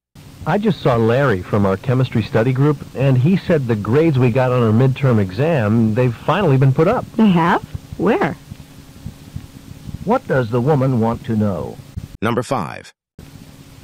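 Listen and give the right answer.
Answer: Where the midterm grades have been posted.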